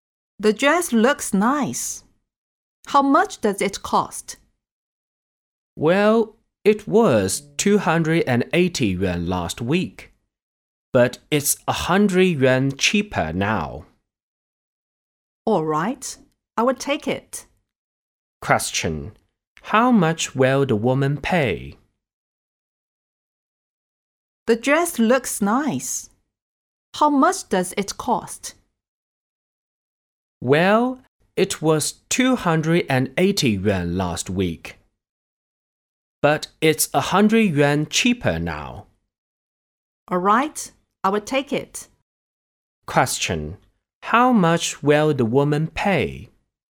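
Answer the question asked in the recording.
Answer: 180 yuan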